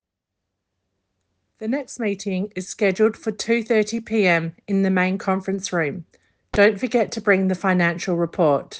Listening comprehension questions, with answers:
Answer the following questions. Write NO MORE THAN TWO WORDS AND/OR A NUMBER for each answer.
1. What time is the meeting scheduled?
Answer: 2:30

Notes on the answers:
The next meeting is scheduled for 2:30 PM in the main conference room.